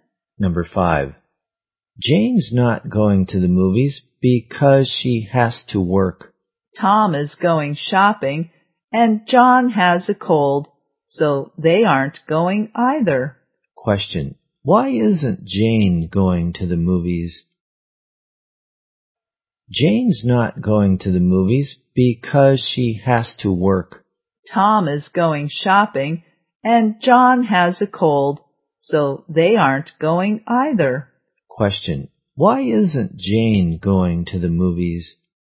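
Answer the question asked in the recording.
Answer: Because she has to work.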